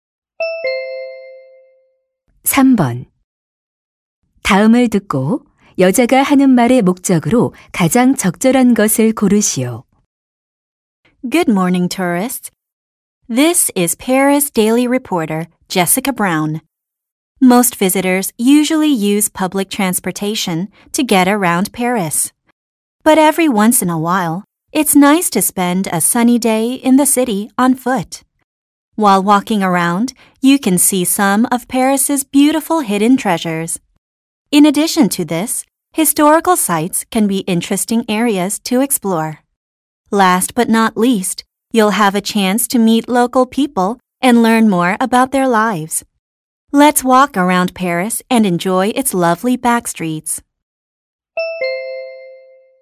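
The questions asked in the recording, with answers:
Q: 다음을 듣고 여자가 하는 말의 목적으로 가장 적절한 것을 고르시오.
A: 파리를 걸어서 관광하도록 권하려고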